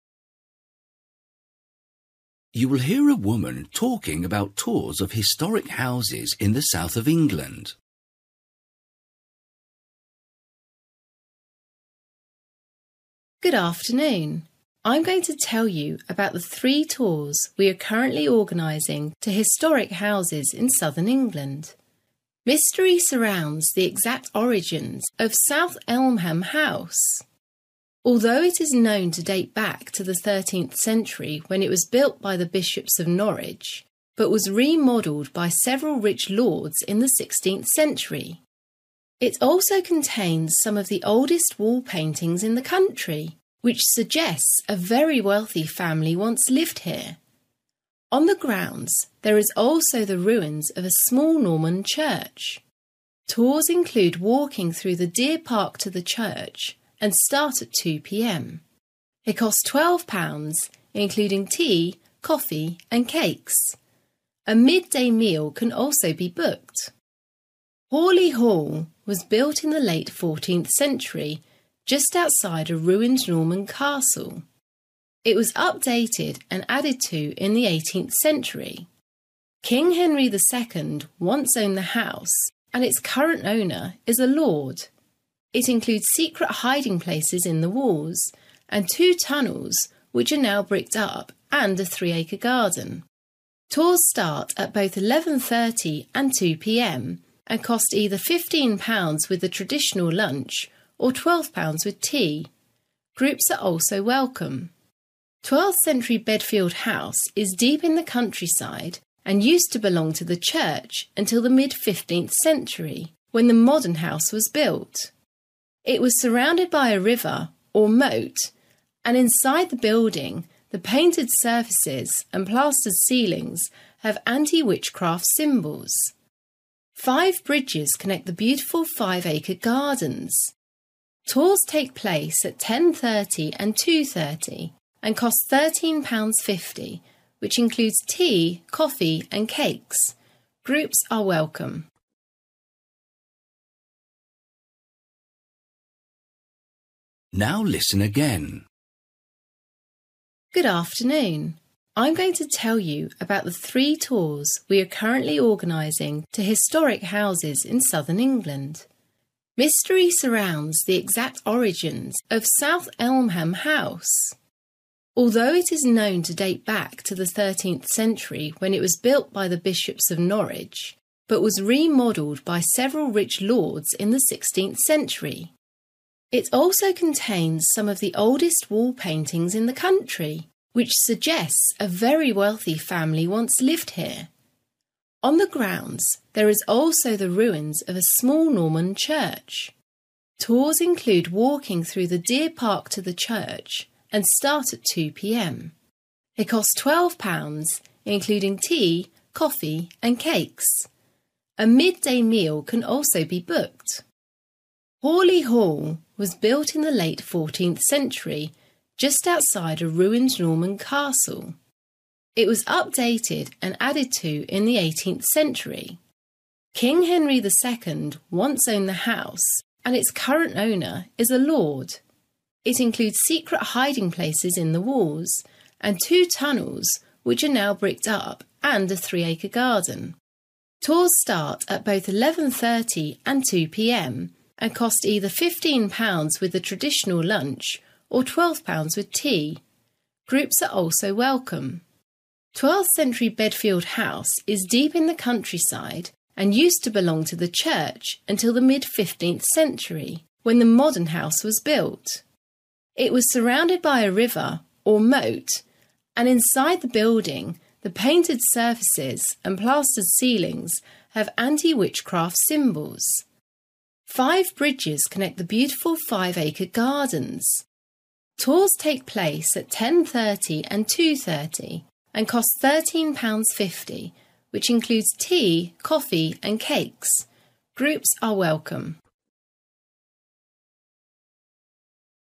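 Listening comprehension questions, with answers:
For each question, write the correct answer in the gap. Write one or two words or a number or a date or a time. You will hear a woman talking about tours of historic houses in the south of England.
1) It was built around the 1300s, but it was greatly improved in the (1) .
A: 16th century

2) It must have been the home of a (2) , as its wall paintings suggest.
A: very wealthy family

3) One of its best features is the secret (3) in the walls.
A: hiding places

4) Tours take place at 11.30 and 2 pm and are £15 with a (4) , or £12 with tea.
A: traditional lunch

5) Gardens are joined by (5) .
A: five bridges

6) Tours start at 10.30 and 2.30 and one has to pay £ (6) .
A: 13.50

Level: Luyện nghe trình độ B1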